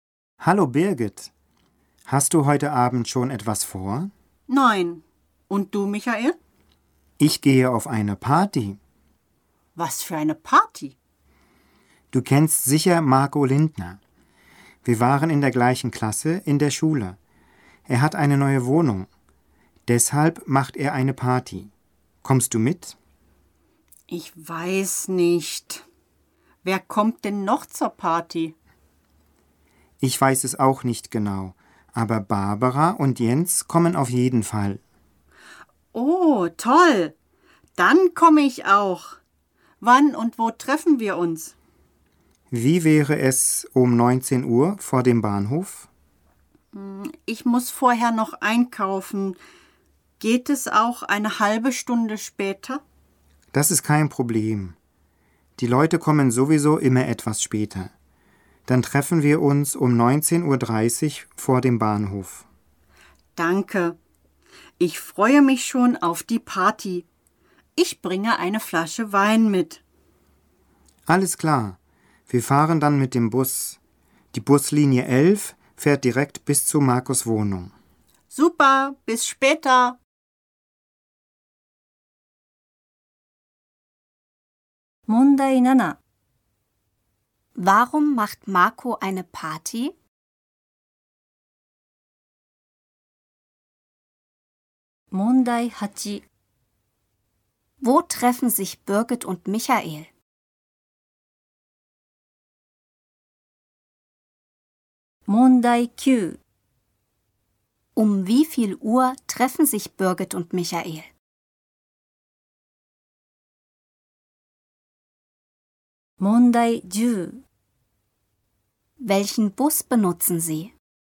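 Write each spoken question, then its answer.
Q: Warum macht Marco eine Party?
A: Er hat eine neue Wohnung.

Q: Wo treffen sich Birgit und Michael?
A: Vor dem Bahnhof

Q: Um wie viel Uhr treffen sich Birgit und Michael?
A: 19.30 Uhr

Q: Welchen Bus benutzen Sie?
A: Buslinie 11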